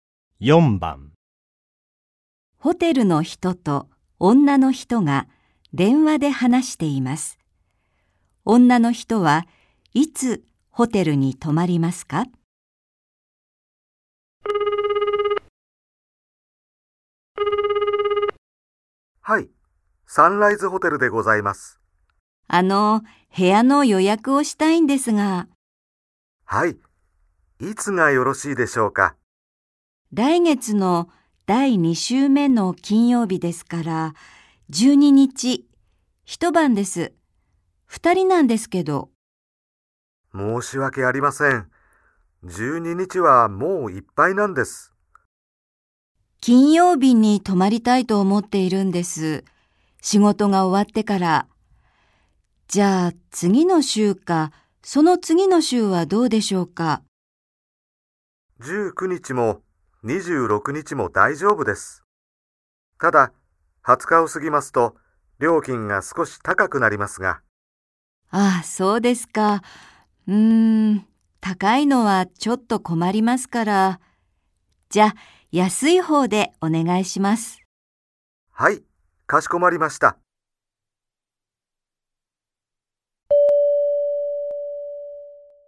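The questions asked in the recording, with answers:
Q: 女の人はいつホテルに泊まりますか?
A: 19日(金曜日)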